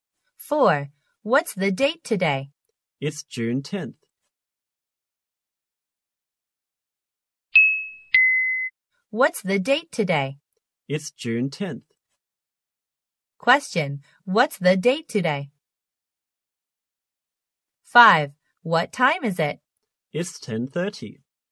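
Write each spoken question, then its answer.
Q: What's the date today?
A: June 10th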